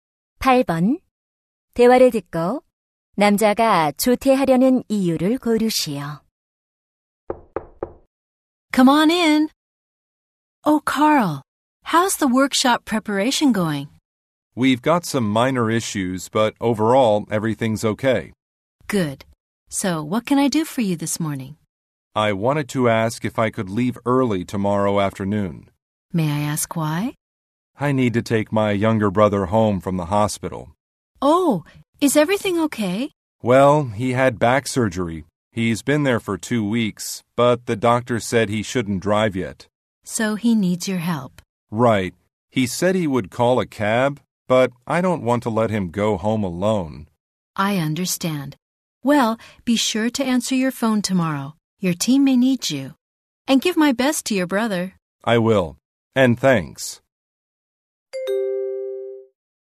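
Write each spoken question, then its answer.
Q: 대화를 듣고 남자가 조퇴하려는 이유를 고르시오.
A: 퇴원하는 남동생을 집에 데려다주려고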